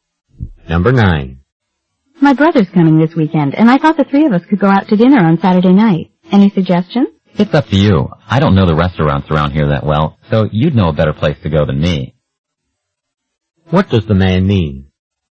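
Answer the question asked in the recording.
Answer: The woman should choose the restaurant.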